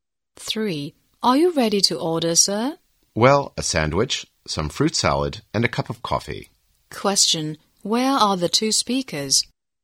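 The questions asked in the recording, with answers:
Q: where are the two speakers?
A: In a restaurant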